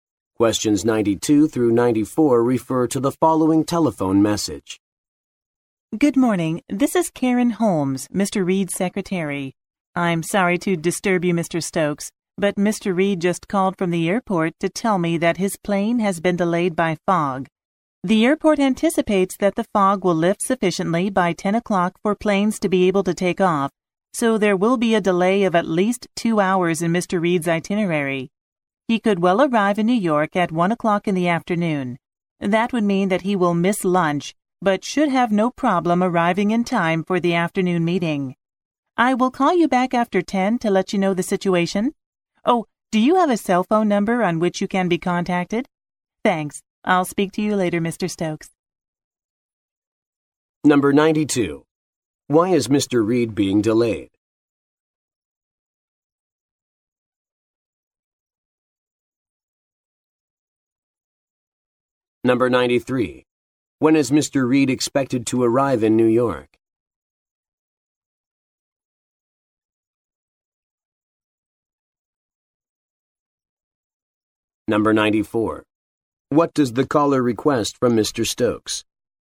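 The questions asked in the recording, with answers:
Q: Why is Mr. Reed being delayed?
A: Fog

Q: When is Mr. Reed expected to arrive in New York?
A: At 1 p.m.

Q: Stokes? Go on to the next page.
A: A cell phone number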